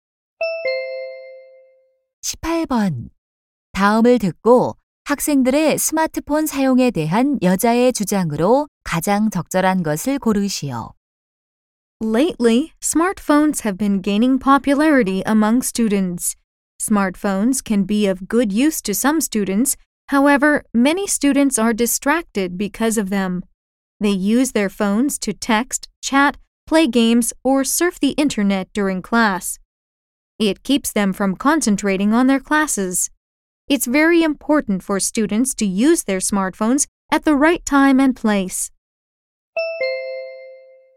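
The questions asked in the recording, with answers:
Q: 학생들의 스마트폰 사용에 대한 여자의 주장으로 가장 적절한 것을 고르시오.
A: 학생들은 스마트폰을 적절한 때와 장소에서 사용해야 한다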